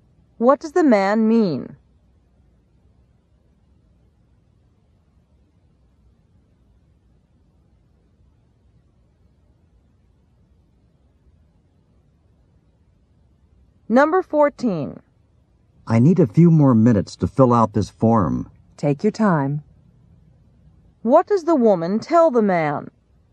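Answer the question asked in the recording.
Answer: He doesn't need to hurry.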